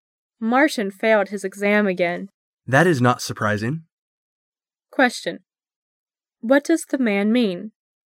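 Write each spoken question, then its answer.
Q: What does the man mean?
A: He expected Martin to fail.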